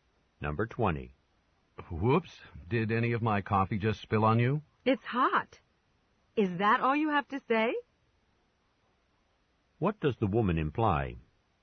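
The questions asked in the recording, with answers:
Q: What does the woman imply?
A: The man should apologize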